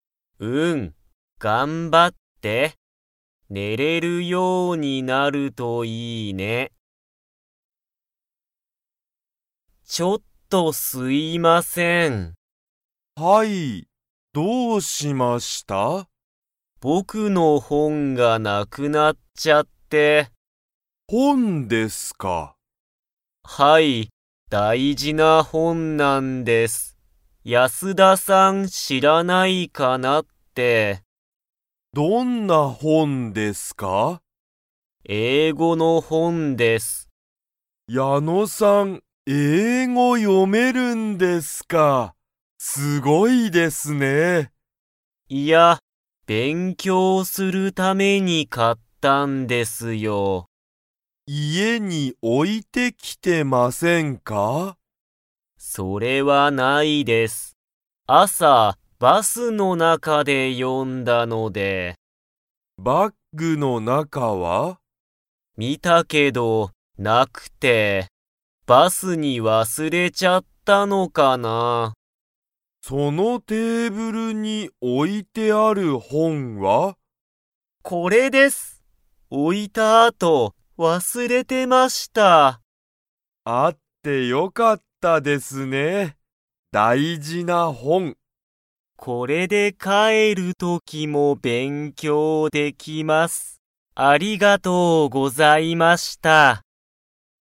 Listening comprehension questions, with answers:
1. 矢野(やの)さんの____本(ほん)がなくなった。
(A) 大事(だいじ)な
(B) 難(むずか)しい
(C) 好(す)きな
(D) 日本語(にほんご)の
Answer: 大事(だいじ)な

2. 矢野(やの)さんはその本(ほん)をバスに忘(わす)れましたか?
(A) はい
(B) いいえ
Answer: いいえ

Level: Level 2

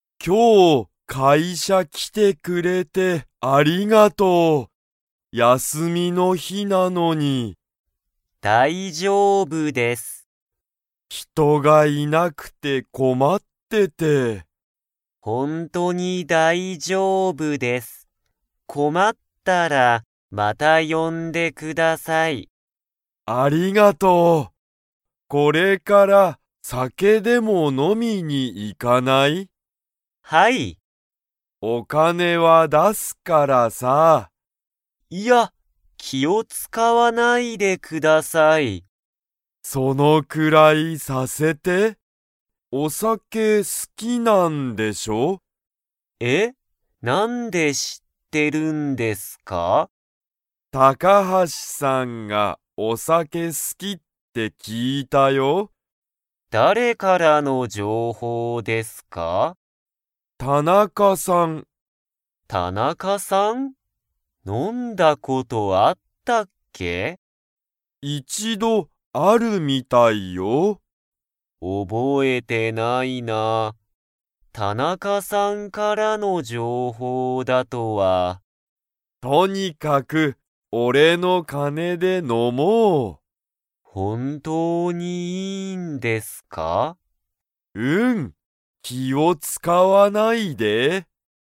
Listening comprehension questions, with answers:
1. 高橋たかはしさんは、何なにが好すきですか?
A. 休やすみ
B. 仕事しごと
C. お金かね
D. お酒さけ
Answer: お酒さけ

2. 高橋たかはしさんは、田中たなかさんとお酒さけを飲のんだことを 。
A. 覚おぼえている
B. 覚おぼえていない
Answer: 覚おぼえていない

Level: Level 3

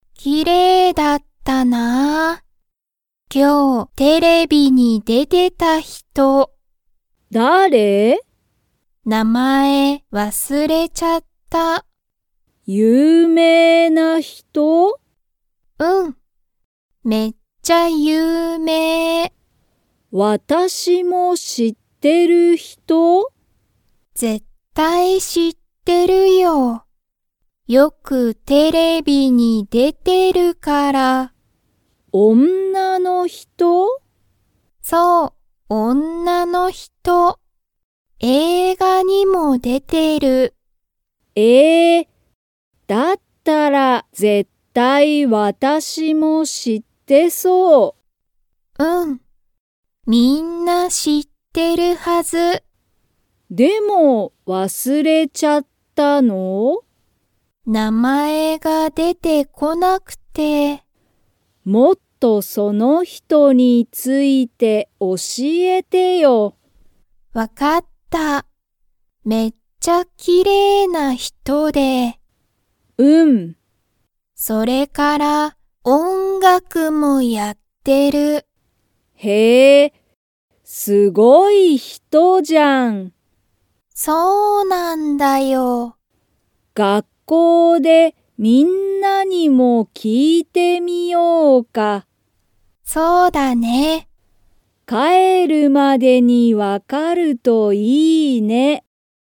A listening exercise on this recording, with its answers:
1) 今日(きょう)テレビに出(で)てた人(ひと)は、____。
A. 映画(えいが)には出(で)ていない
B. 学校(がっこう)にいる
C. めっちゃ有名(ゆうめい)だ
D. 誰だれも知しらない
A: めっちゃ有名(ゆうめい)だ

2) カナエは、その人(ひと)の名前(なまえ)がわかりますか?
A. はい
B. いいえ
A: いいえ

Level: Level 2

